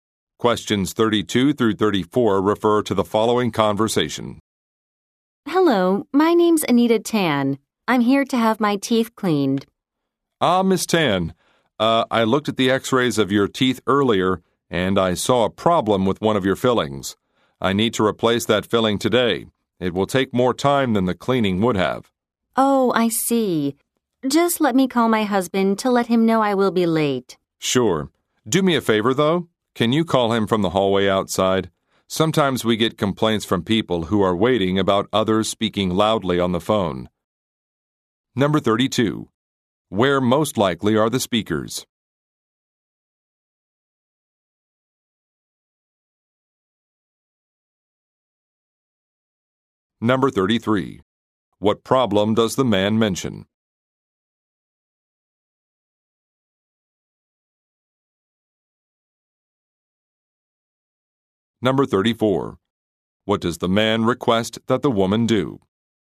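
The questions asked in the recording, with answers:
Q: Where most likely are the speakers?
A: At a dentist's office

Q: What problem does the man mention?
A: One of her fillings needs replacing

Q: What does the man request that the woman do?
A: Make her phone call from the hallway outside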